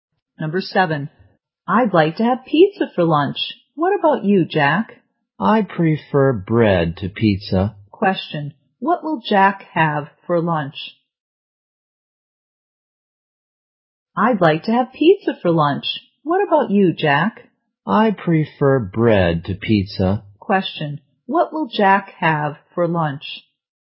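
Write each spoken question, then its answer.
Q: what will Jack have for lunch?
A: Bread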